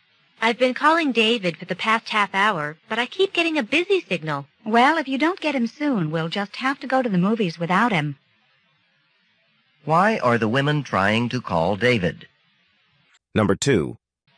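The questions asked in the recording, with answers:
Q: Why are the women trying to call David?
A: To have him go to the movies with them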